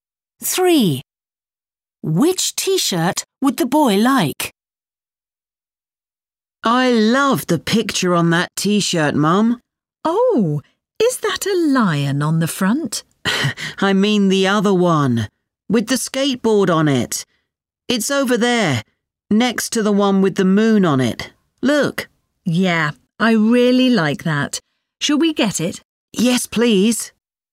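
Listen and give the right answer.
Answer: The one with the skateboard on it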